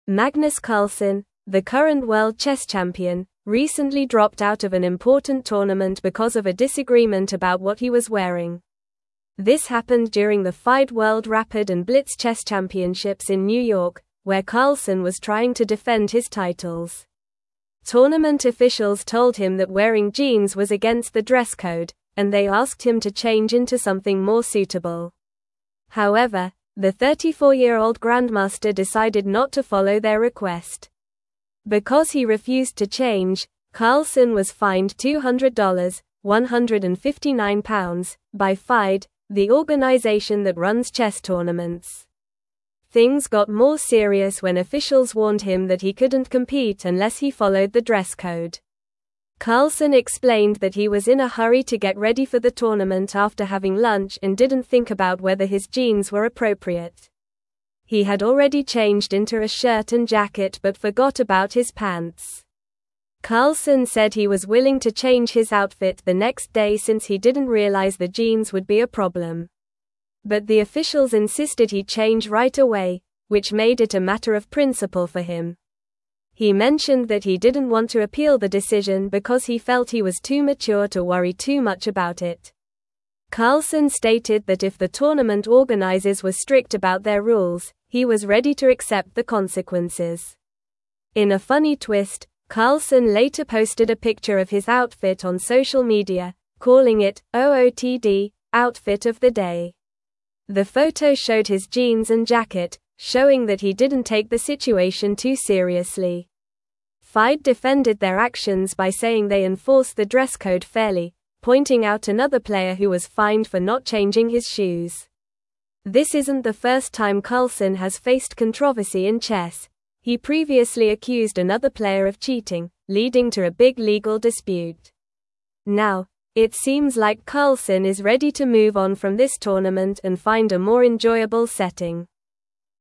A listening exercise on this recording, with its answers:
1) (1)______ officials told him that wearing jeans was against the dress code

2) they asked him to (2)______ into something more suitable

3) However, the 34-year-old (3)______ decided not to (4)______ their request.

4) However, the 34-year-old (3)______ decided not to (4)______ their request.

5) the organization that runs chess (5)______s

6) Things got more serious when (6)______ warned him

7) he was in a (7)______ to get ready for the tournament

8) He had already (8)______ into a shirt and jacket but forgot about his pants.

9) He (9)______ that he didn't want to appeal the decision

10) (10)______ stated that if the tournament organizers were strict about their rules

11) Carlsen later posted a picture of his (11)______ on (12)______ media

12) Carlsen later posted a picture of his (11)______ on (12)______ media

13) The photo showed his (13)______ and jacket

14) (14)______ out another player who was fined for not changing his shoes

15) leading to a big (15)______ dispute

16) Now, it seems like Carlsen is (16)______ to move on from this tournament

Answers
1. Tournament
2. change
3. grandmaster
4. follow
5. tournament
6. officials
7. hurry
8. changed
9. mentioned
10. Carlsen
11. outfit
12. social
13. jeans
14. pointing
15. legal
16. ready

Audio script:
Magnus Carlsen, the current world chess champion, recently dropped out of an important tournament because of a disagreement about what he was wearing. This happened during the FIDE World Rapid and Blitz Chess Championships in New York, where Carlsen was trying to defend his titles. Tournament officials told him that wearing jeans was against the dress code, and they asked him to change into something more suitable. However, the 34-year-old grandmaster decided not to follow their request.
Because he refused to change, Carlsen was fined $200 (£159) by FIDE, the organization that runs chess tournaments. Things got more serious when officials warned him that he couldn't compete unless he followed the dress code. Carlsen explained that he was in a hurry to get ready for the tournament after having lunch and didn't think about whether his jeans were appropriate. He had already changed into a shirt and jacket but forgot about his pants.
Carlsen said he was willing to change his outfit the next day since he didn't realize the jeans would be a problem. But the officials insisted he change right away, which made it a matter of principle for him. He mentioned that he didn't want to appeal the decision because he felt he was too mature to worry too much about it. Carlsen stated that if the tournament organizers were strict about their rules, he was ready to accept the consequences.
In a funny twist, Carlsen later posted a picture of his outfit on social media, calling it "OOTD" (outfit of the day). The photo showed his jeans and jacket, showing that he didn't take the situation too seriously. FIDE defended their actions by saying they enforce the dress code fairly, pointing out another player who was fined for not changing his shoes. This isn't the first time Carlsen has faced controversy in chess; he previously accused another player of cheating, leading to a big legal dispute. Now, it seems like Carlsen is ready to move on from this tournament and find a more enjoyable setting.

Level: Level 3